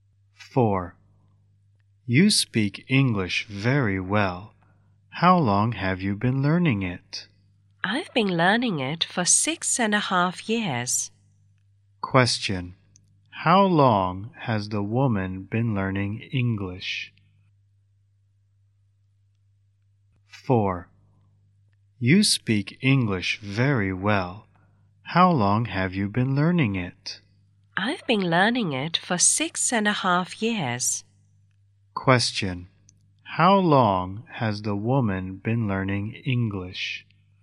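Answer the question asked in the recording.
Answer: 6.5 years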